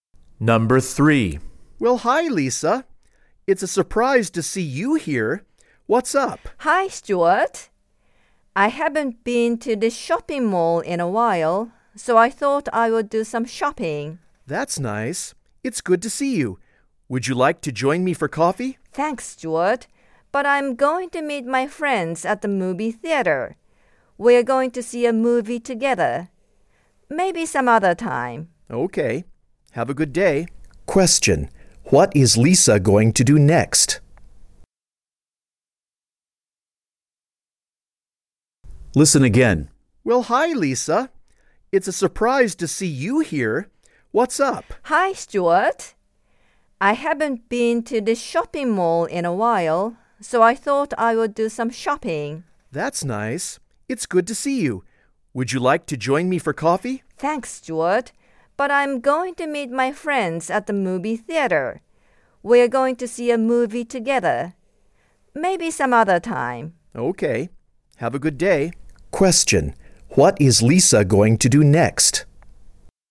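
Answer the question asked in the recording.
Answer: Meet her friends at the movie theater to see a movie.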